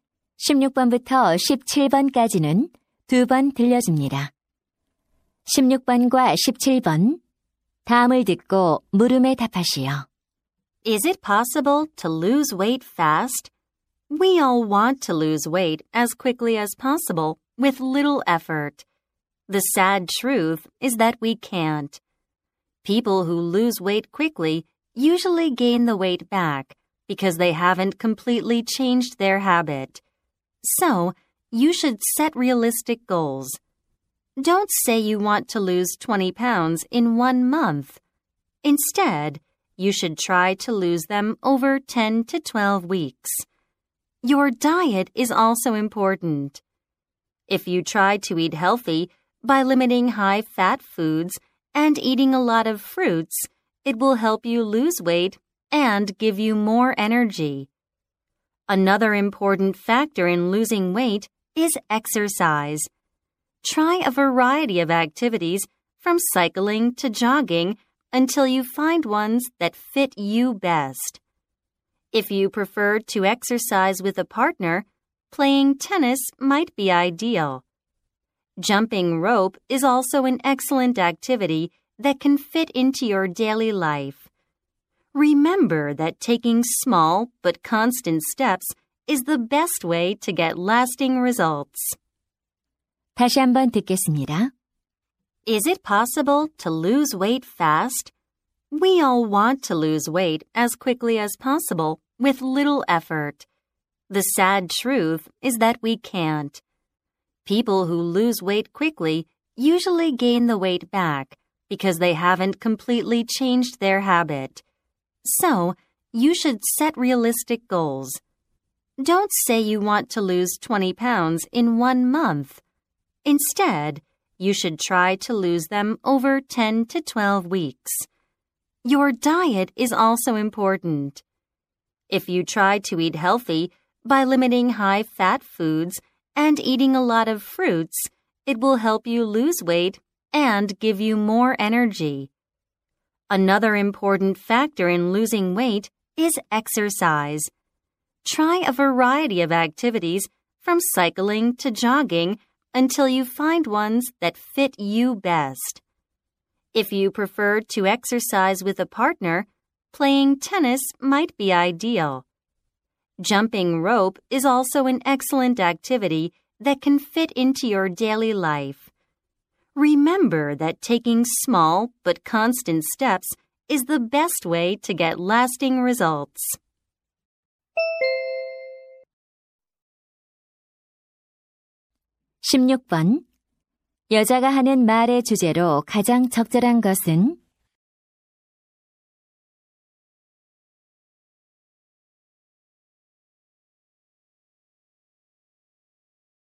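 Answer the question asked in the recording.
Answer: 오래 가는 체중 감량을 위한 방법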